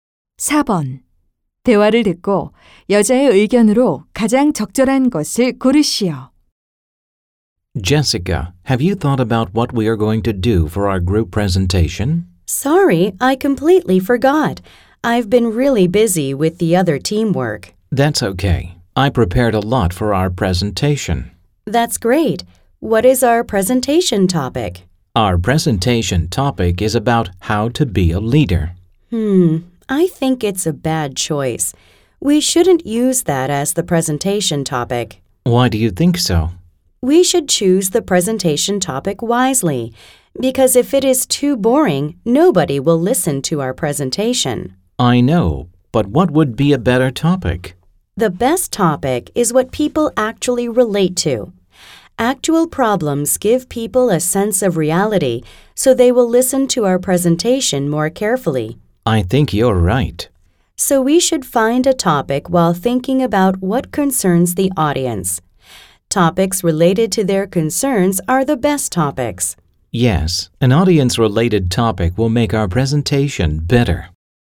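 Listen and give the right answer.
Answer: 발표 주제는 청중의 관심사와 관련된 것으로 정해야 한다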